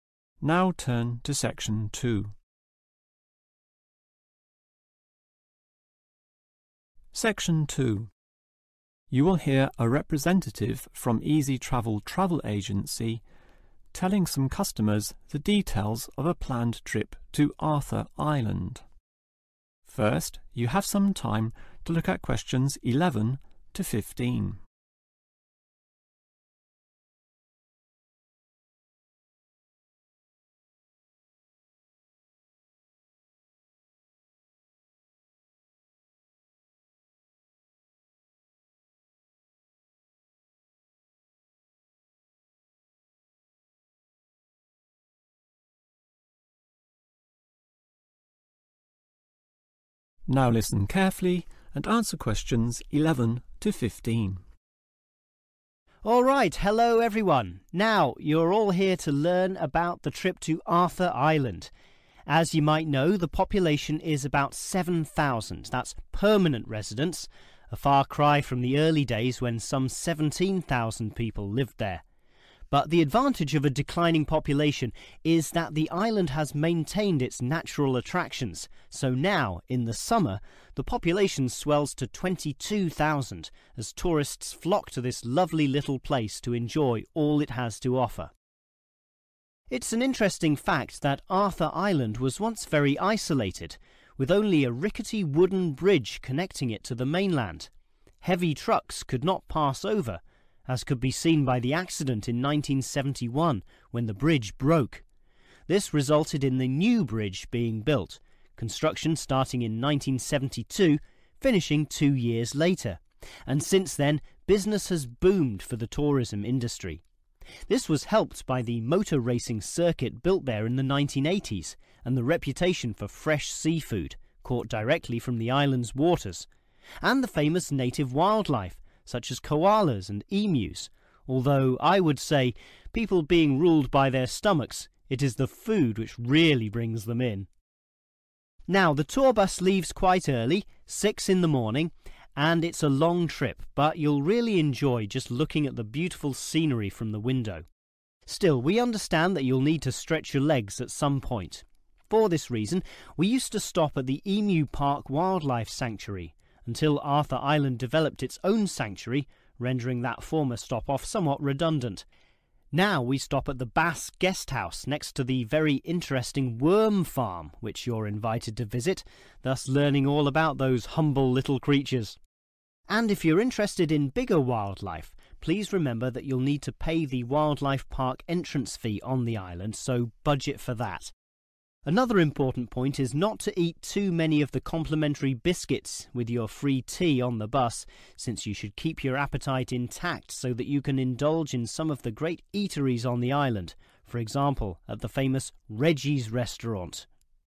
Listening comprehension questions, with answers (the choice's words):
Choose the correct letter A, B or C.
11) Arthur Island's summer population is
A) 7000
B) 17000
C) 22000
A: 22000

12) The new bridge was completed in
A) 1971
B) 1972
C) 1974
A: 1974

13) The island is particularly well known for its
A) motor racing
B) seafood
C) native wildlife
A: seafood

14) There will be a stop-off at a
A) worm farm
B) wildlife sanctuary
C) scenic lookout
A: worm farm

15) The tour price includes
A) the wildlife park's entrance fee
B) a meal at Reggie's restaurant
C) tea and biscuits on the bus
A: tea and biscuits on the bus